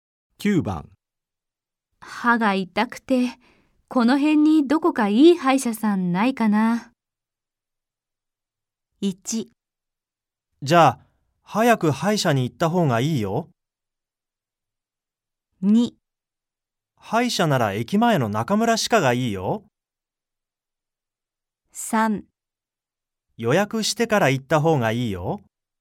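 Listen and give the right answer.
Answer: 2: 歯医者なら駅前の中村歯科がいいよ。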